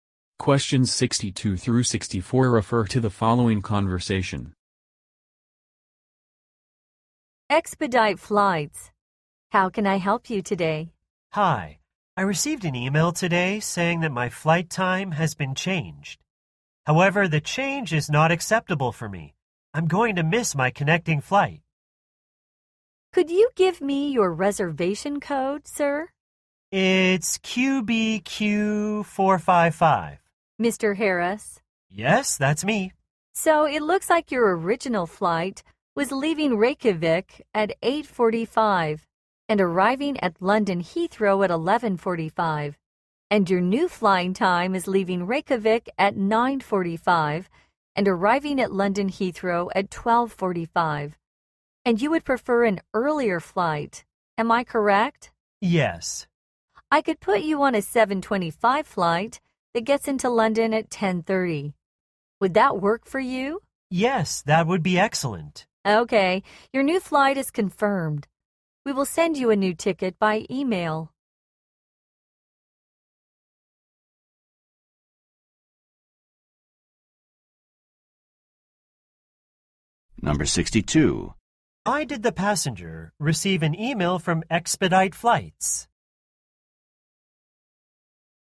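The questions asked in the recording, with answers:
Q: Why did the passenger receive an email from Expedite Flights?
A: His flight time had been changed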